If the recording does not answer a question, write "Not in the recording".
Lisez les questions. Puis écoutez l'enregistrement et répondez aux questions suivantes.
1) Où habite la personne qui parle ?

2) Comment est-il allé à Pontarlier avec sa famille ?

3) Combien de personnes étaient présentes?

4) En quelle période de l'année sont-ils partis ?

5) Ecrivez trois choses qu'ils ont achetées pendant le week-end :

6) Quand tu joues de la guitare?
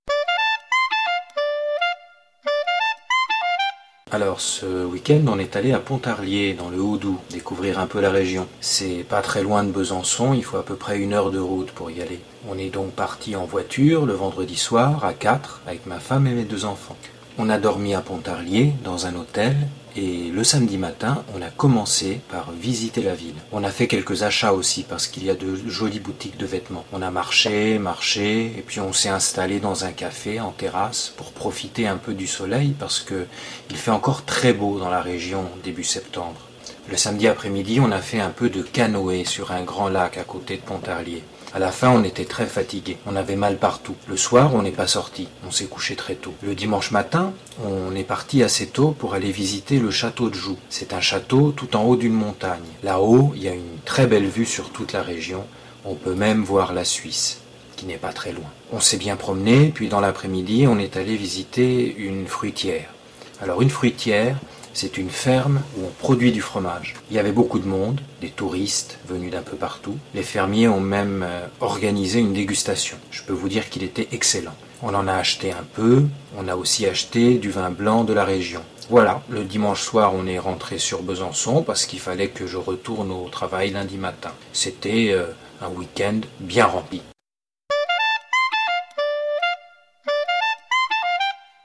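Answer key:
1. À Besançon
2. En voiture
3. 4
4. Début septembre
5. Des vêtements, du fromage, du vin blanc
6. Not in the recording

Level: Nivo A2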